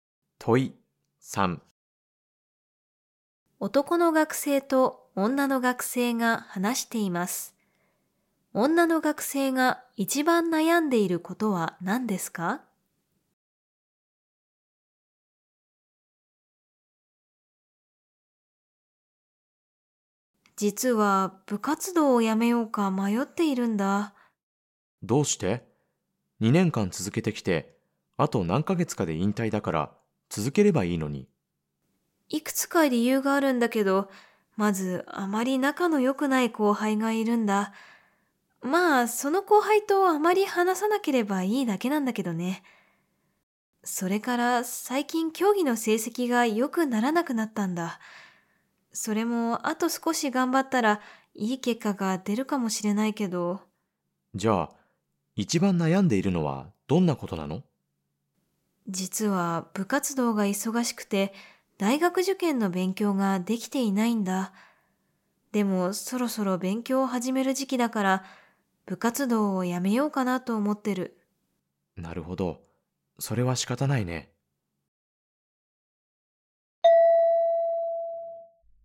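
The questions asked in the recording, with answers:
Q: 女の学生が一番悩んでいることは何ですか?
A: 部活動が忙しくて大学受験の勉強ができていないこと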